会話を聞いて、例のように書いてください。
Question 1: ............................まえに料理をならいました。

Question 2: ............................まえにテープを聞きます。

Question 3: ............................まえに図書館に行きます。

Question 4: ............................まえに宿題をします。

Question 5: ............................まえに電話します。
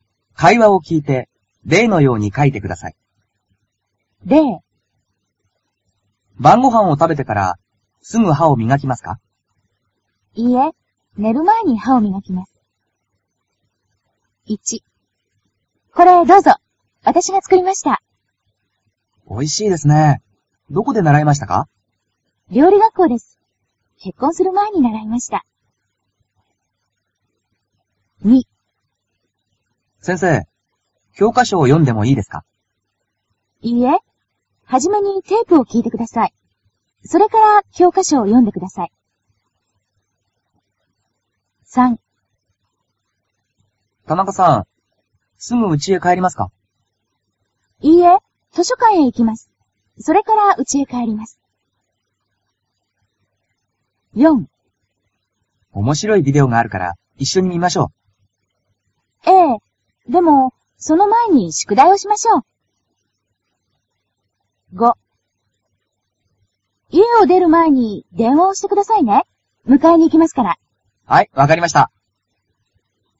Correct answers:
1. けっこんする
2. きょうかしょをよむ
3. うちへかえる
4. ビデオをみる
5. いえをでる

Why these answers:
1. 料理学校です。結婚する前に習いました。
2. いいえ、はじめにテープを聞いてください。それから、教科書を読んでください。
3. いいえ、図書館へ行きます。それからうちへ帰ります。
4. ええ。でもその前に宿題をしましょう。
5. 家を出る前に電話をしてくださいね。迎えに行きますから。

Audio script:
例
A:晩ごはんを食べてから、すぐ歯を磨きますか。
B:いいえ、寝る前に歯を磨きます。
1
A:これ、どうぞ。わたしが作りました。
B:おいしいですね。どこで習いましたか。
A:料理学校です。結婚する前に習いました。
2
A:先生、教科書を読んでもいいですか。
B:いいえ、はじめにテープを聞いてください。それから、教科書を読んでください。
3
A:田中さん、すぐうちへ帰りますか。
B:いいえ、図書館へ行きます。それからうちへ帰ります。
4
A:おもしろいビデオがあるから、一緒に見ましょう。
B:ええ。でもその前に宿題をしましょう。
5
A:家を出る前に電話をしてくださいね。迎えに行きますから。
B:はい、わかりました。

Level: cơ bản